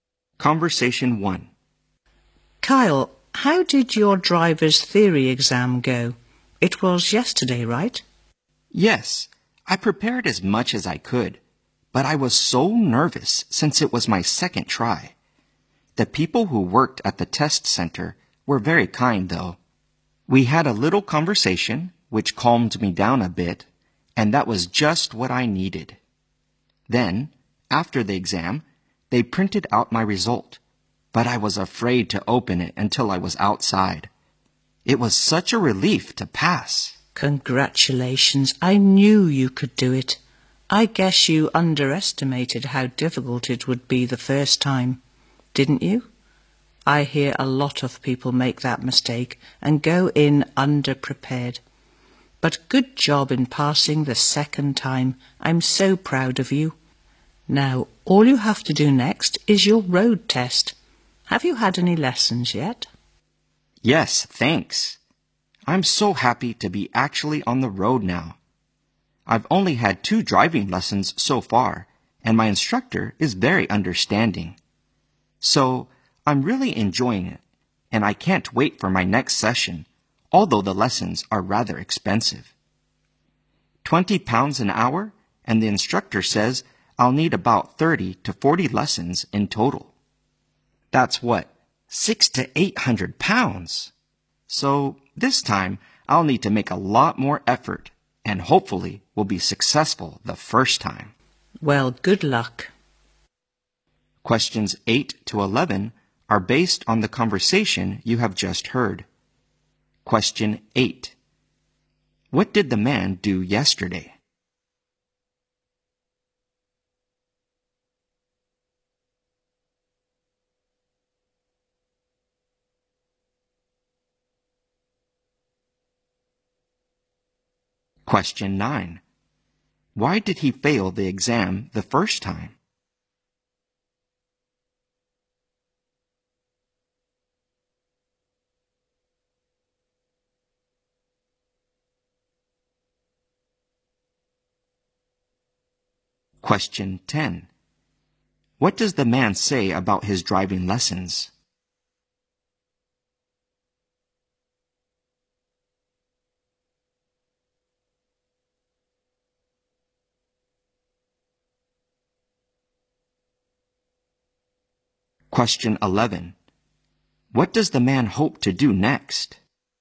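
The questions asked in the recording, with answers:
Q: What did the man do yesterday?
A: He took his driver's theory exam and passed it.

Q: Why did he fail the exam the first time?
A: He underestimated how hard it was and went in underprepared.

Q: What does the man say about his driving lessons?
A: He enjoys them, but they are rather expensive.

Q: What does the man hope to do next?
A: Pass his road test on the first try.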